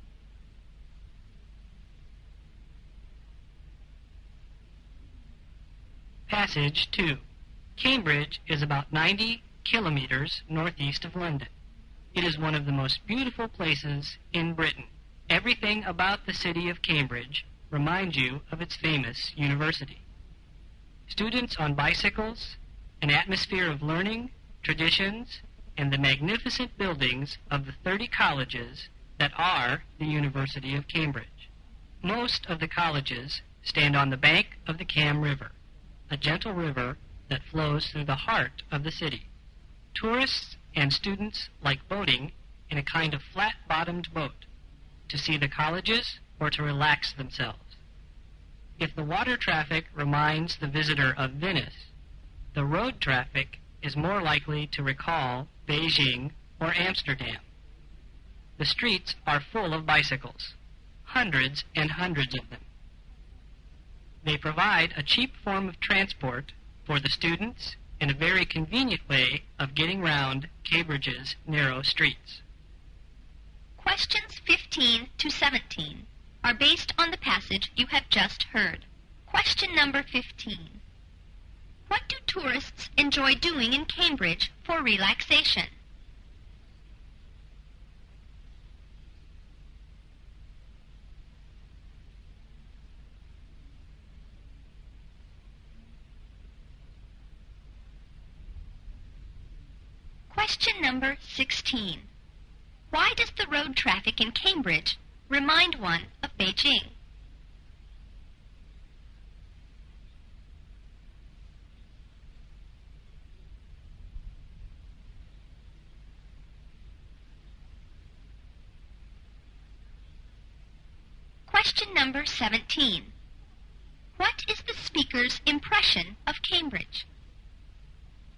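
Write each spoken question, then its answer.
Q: What do tourists enjoy doing in Cambridge for relaxation?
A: Boating on the river

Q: Why does the road traffic in Cambridge remind one of Beijing?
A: The streets are full of bicycles

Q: What is the speaker's impression of Cambridge?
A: It is one of the most beautiful places in Britain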